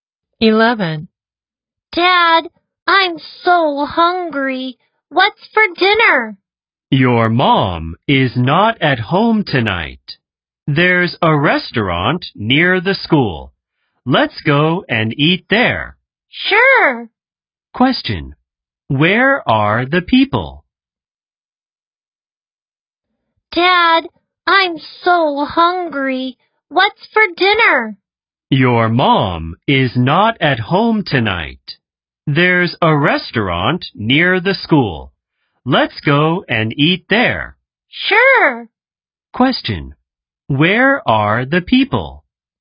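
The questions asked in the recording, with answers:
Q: Question. Where are the people?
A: At home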